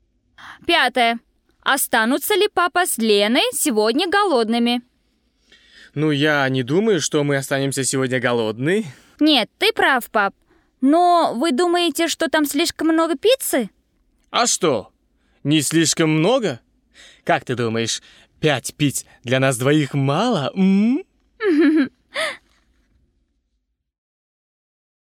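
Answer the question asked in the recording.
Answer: Нет, у них много пиццы (5 пицц)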